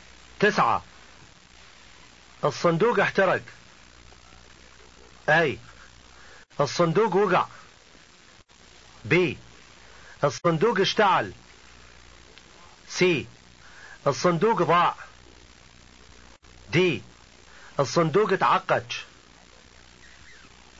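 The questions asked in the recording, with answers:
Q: تسعة الصندوق احترق.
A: B: الصندوق اشتعل.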